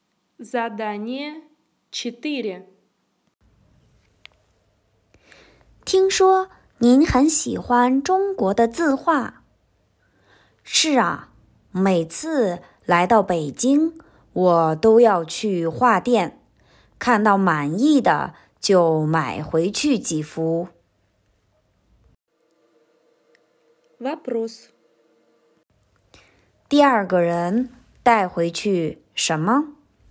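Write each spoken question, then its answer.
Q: 第二个人带回去什么?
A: 中国的字画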